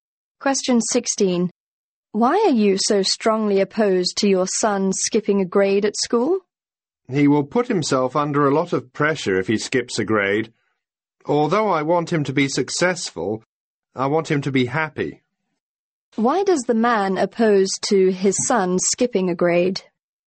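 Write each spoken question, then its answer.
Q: Why does the man oppose to his son skipping a grade?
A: It would put his son under a lot of pressure; he wants him to be happy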